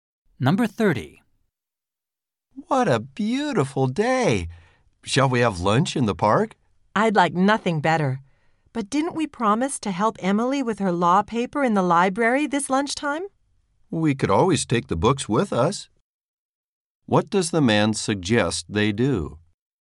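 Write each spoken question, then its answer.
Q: What does the man suggest they do?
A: Take the books to the park and help Emily there.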